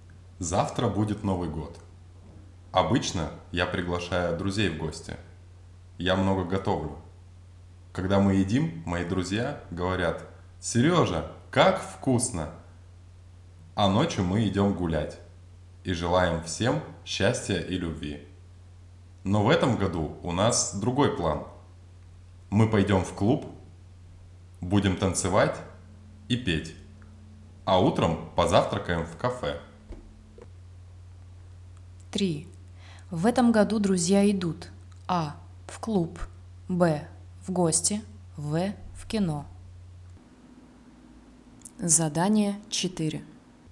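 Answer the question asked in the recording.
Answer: А: в клуб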